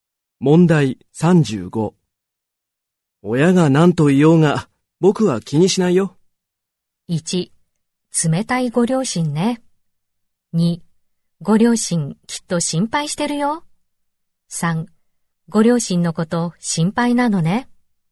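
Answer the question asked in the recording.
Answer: 2: ご両親きっと心配してるよ。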